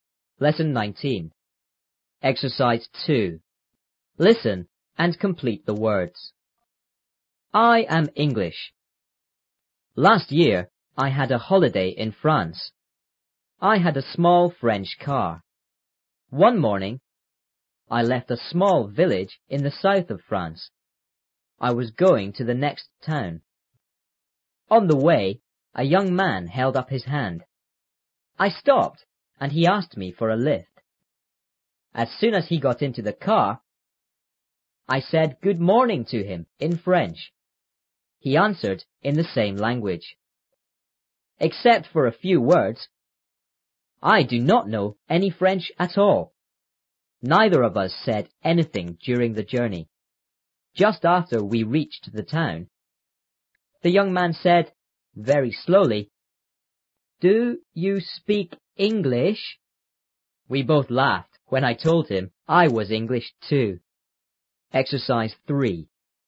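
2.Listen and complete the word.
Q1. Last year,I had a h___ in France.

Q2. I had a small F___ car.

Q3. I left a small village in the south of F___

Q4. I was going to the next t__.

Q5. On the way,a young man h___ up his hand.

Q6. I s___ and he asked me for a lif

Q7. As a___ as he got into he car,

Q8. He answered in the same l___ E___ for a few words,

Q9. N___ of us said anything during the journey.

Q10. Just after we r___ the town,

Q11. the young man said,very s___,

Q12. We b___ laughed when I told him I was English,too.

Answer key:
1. holiday
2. French
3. France
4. town
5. held
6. stopped; lift
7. soon
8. language; Except
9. Neither
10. reached
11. slowly
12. both

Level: 初中英语广州版3B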